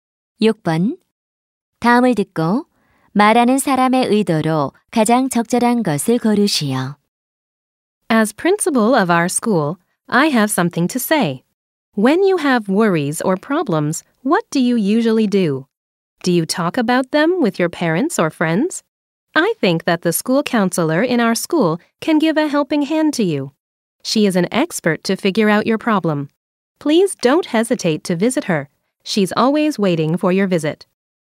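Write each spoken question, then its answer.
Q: 다음을 듣고 말하는 사람의 의도로 가장 적절한 것을 고르시오.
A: 학교 상담 선생님 방문 권유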